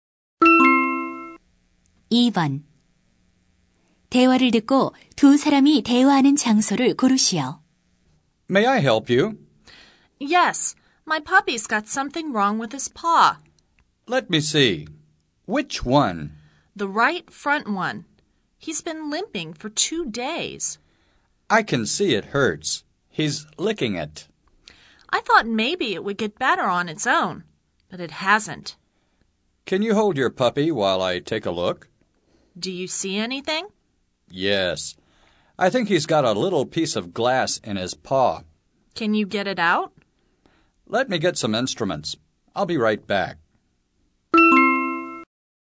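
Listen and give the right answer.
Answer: 동물병원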